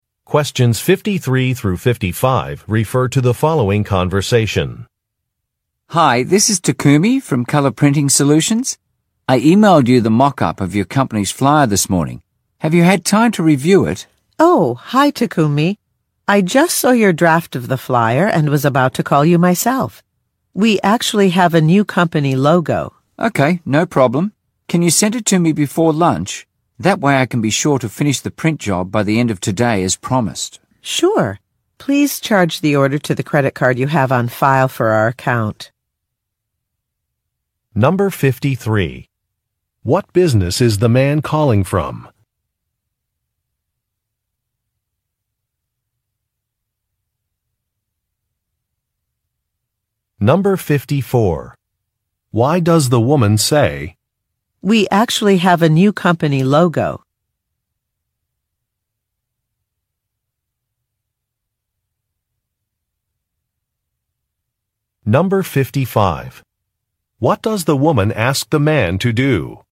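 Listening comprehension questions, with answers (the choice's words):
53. What business is the man calling from?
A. An architectural firm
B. A marketing agency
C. An electronics store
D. A printing shop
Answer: A printing shop

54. Why does the woman say. "We actually have a new company logo"?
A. To compliment a colleague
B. (B) To reassure a client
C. To request an update to an order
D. To express surprise at a decision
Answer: To request an update to an order

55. What does the woman ask the man to do?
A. Charge a credit card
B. Obtain a supervisor's approval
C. Close an account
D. Update a contract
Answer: Charge a credit card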